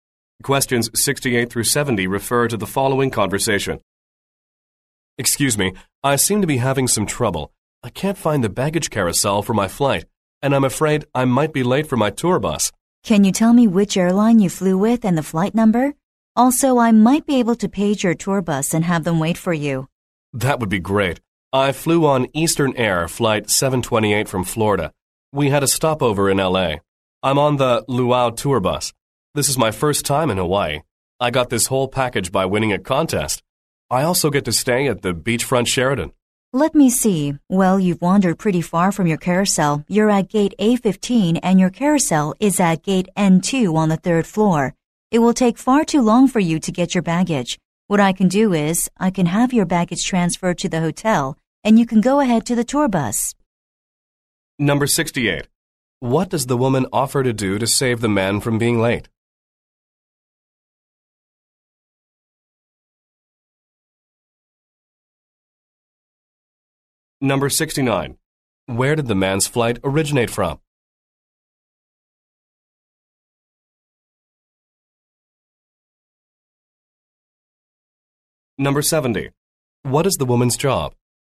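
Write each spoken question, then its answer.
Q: What does the woman offer to do to save the man from being late?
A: Have his baggage sent to the hotel

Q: Where did the man's flight originate from?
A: Florida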